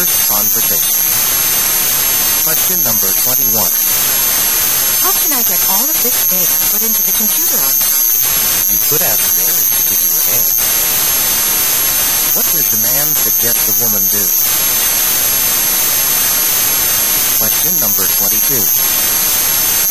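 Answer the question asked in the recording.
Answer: Ask Mary to help her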